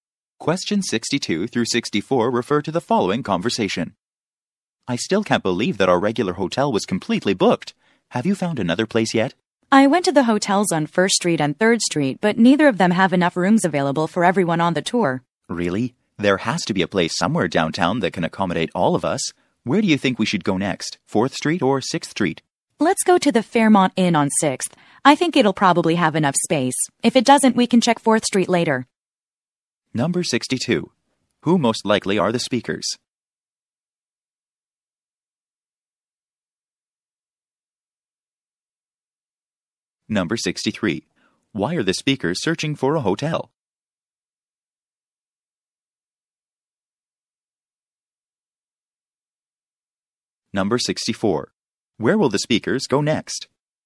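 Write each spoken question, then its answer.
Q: Why are the speakers searching for a hotel?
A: Their regular hotel is fully booked

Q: Where will the speakers go next?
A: The Fairmont Inn on 6th Street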